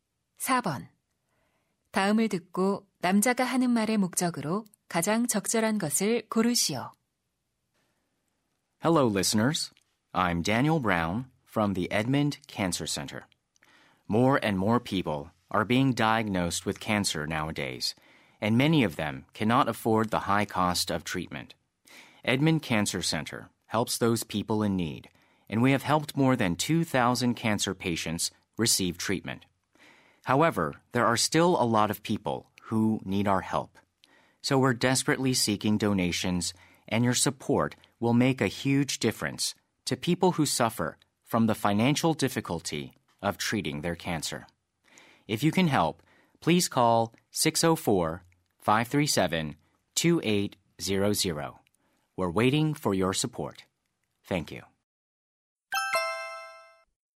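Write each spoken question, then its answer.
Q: 다음을 듣고 남자가 하는 말의 목적으로 가장 적절한 것을 고르시오.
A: 암 환자 치료를 위한 기부를 요청하려고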